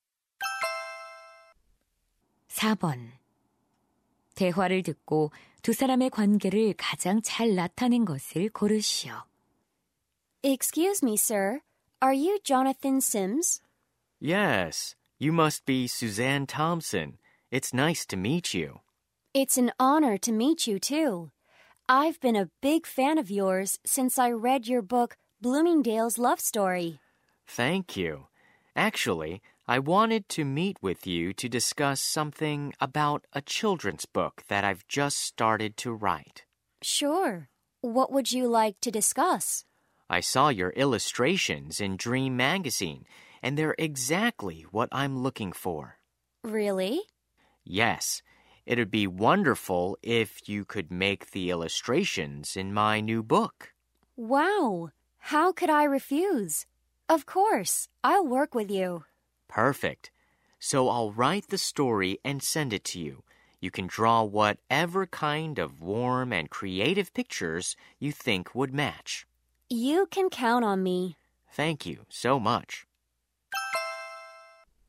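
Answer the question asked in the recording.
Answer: 작가 - 삽화가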